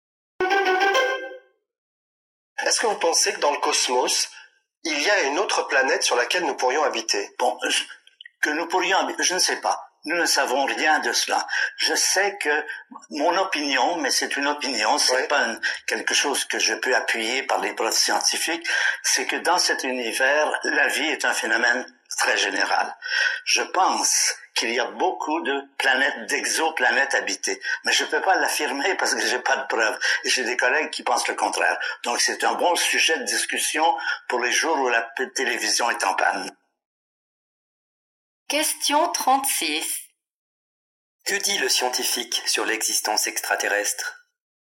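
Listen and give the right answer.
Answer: Il pense qu'il y a de la vie ailleurs mais n'a pas de preuves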